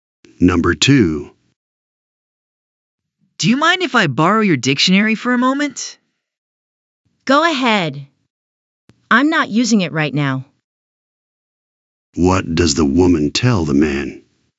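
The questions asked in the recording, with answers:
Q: What does the woman tell the man?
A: He can borrow her dictionary; she isn't using it.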